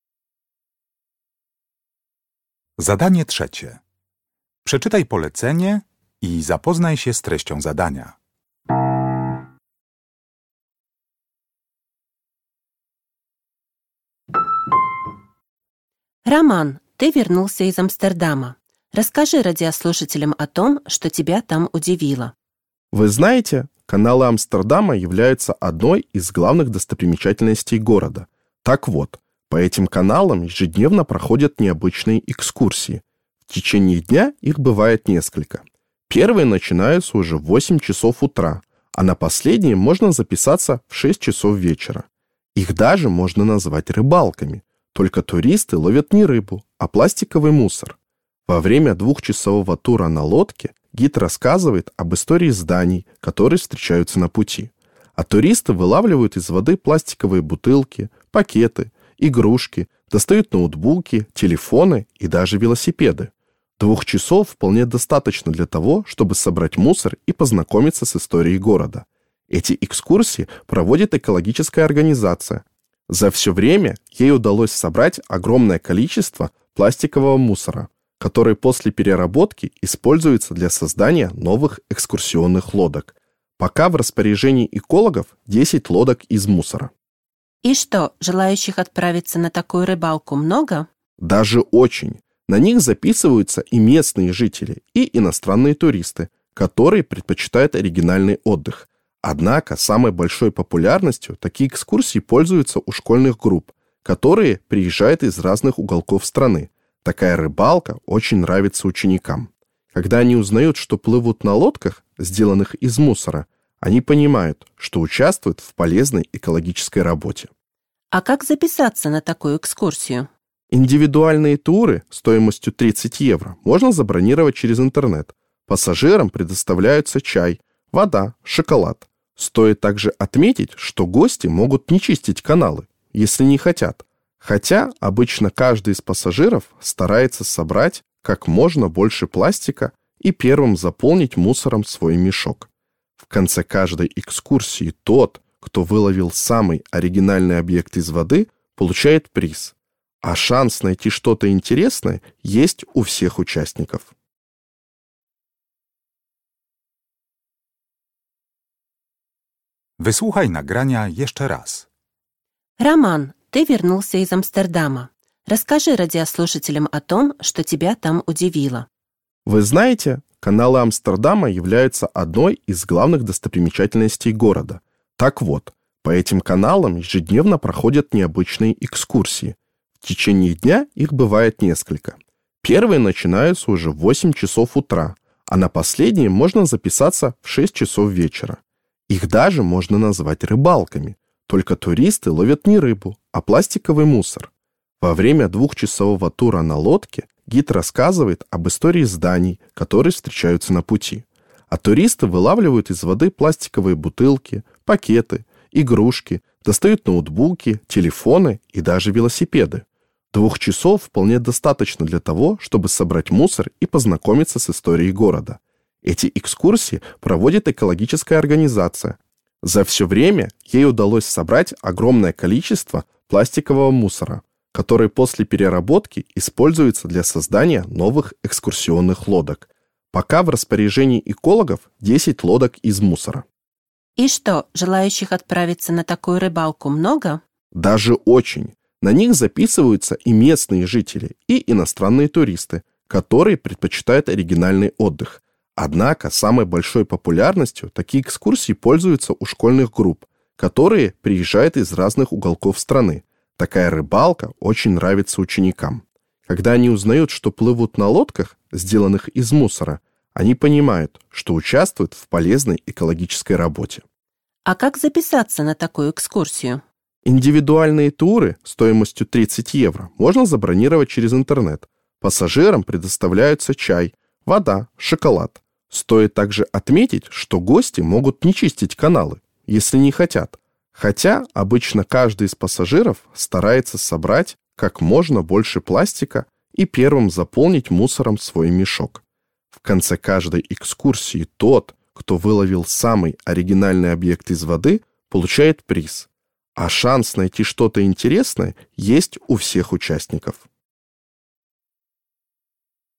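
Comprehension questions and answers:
Uruchamiając odtwarzacz z oryginalnym nagraniem CKE usłyszysz dwukrotnie rozmowę na temat oryginalnej wycieczki po kanałach Amsterdamu. Na podstawie informacji zawartych w nagraniu odpowiedz krótko na pytania 3.1.–3.4., tak aby jak najbardziej precyzyjnie oddać sens wysłuchanego tekstu. Na pytania należy odpowiedzieć w języku rosyjskim.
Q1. Как долго продолжается экскурсия по каналам Амстердама?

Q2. Что делают из пластика, выловленного из каналов?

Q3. Кто чаще всего принимает участие в «экскурсиях-рыбалках»?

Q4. Кому вручают награду в конце рейса?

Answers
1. Два часа.
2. Новые экскурсионные лодки.
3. Школьные группы.
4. Тому, кто выловил самый оригинальный объект из воды.

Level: Poziom: podstawowy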